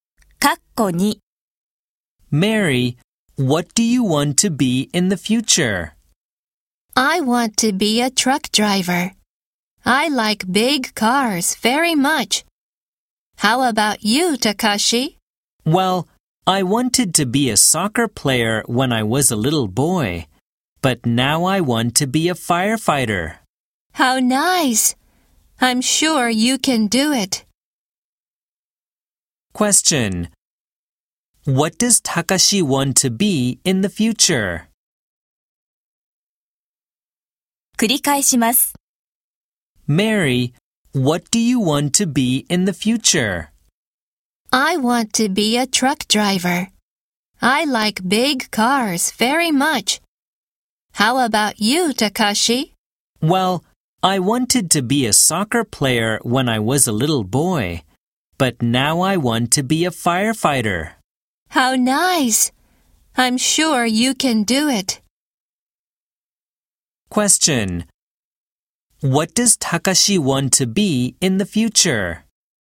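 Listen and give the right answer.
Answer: A firefighter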